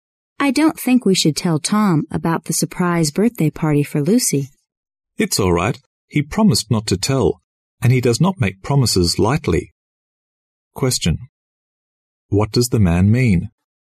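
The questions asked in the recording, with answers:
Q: What does the man mean?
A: Tom can be trusted to keep the secret.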